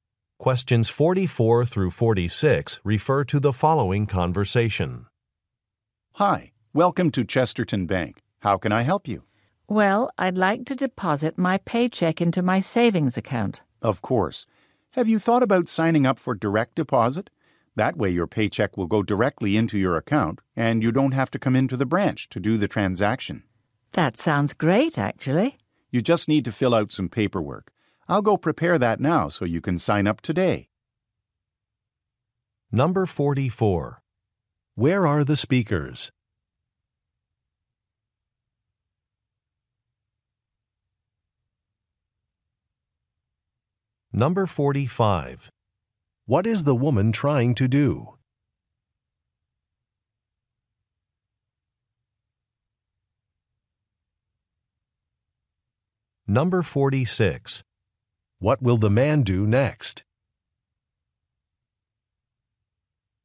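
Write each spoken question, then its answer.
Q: Where are the speakers?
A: At a bank

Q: What is the woman trying to do?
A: Deposit her paycheck

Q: What will the man do next?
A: Prepare paperwork for direct deposit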